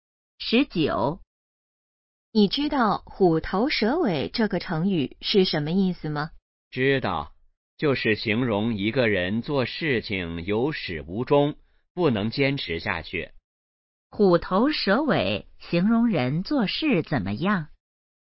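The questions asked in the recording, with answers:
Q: 虎头蛇尾形容人做事怎么样?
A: 有始无终,不能坚持下去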